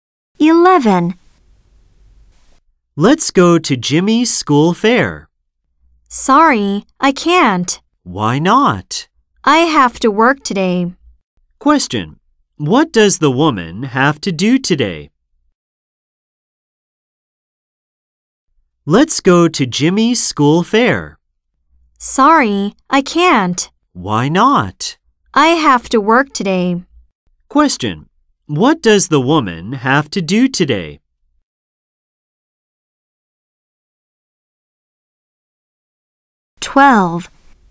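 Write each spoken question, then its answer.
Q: What does the woman have to do today?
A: She has to work.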